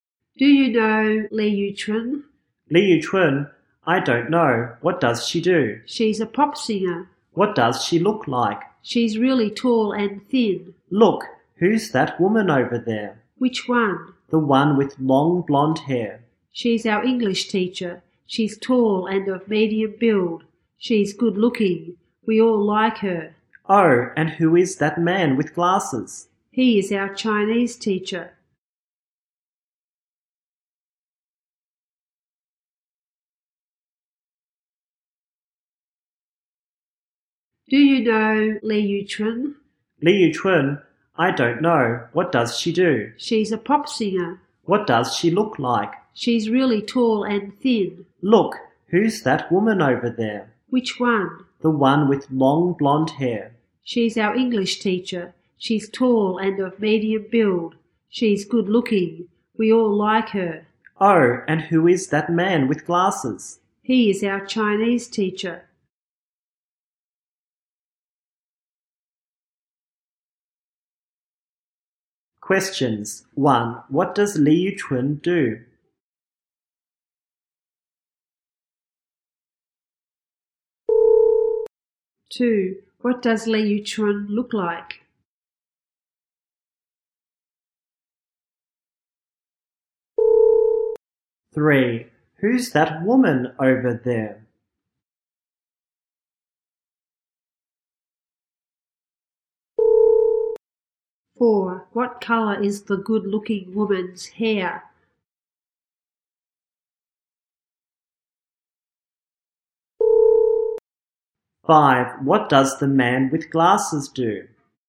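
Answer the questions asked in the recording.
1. She's a pop singer.
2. She's really tall and thin.
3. Their English teacher.
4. Blonde
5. He is a Chinese teacher.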